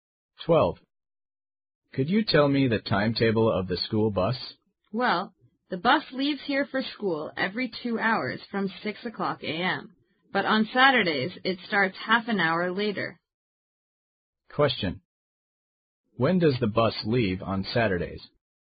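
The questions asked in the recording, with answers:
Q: When does the bus leave on Saturdays?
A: At 6:30 a.m., then every 2 hours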